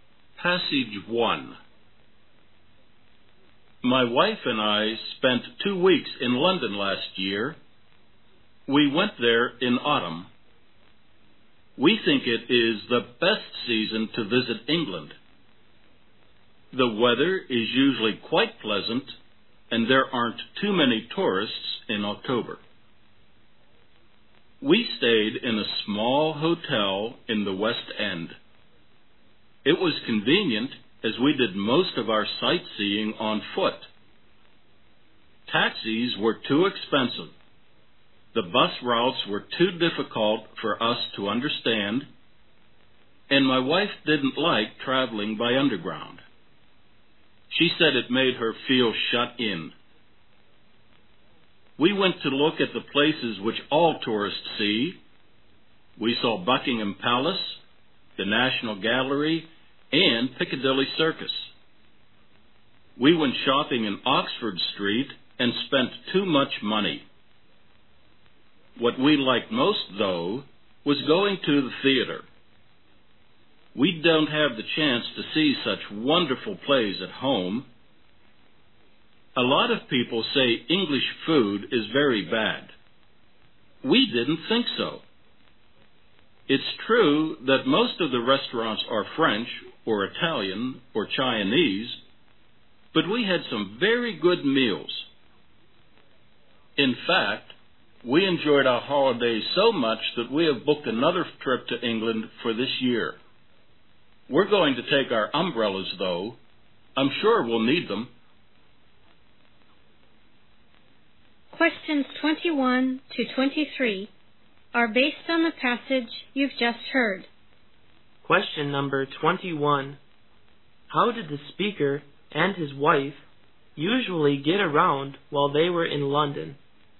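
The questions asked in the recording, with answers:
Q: How did the speaker and his wife usually get around while they were in London?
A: On foot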